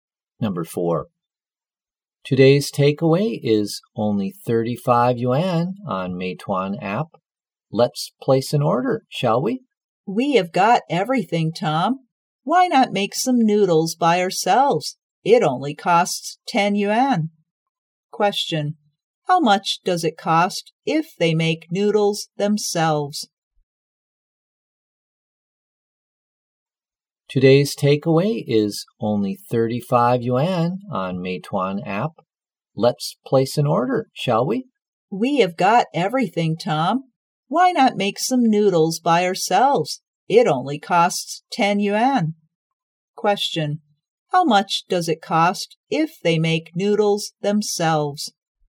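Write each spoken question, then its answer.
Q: how much does it cost if they make noodles themselves?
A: 10 yuan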